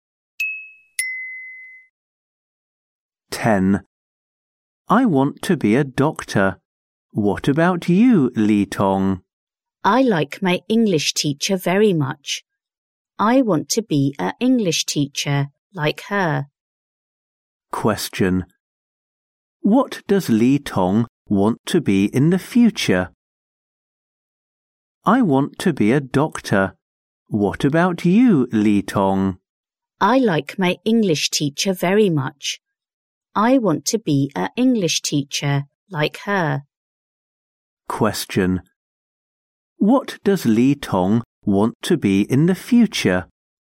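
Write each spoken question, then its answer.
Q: What does Li Tong want to be in the future?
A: An English teacher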